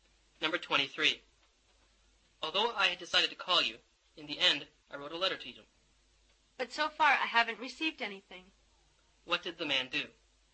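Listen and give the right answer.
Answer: He wrote a letter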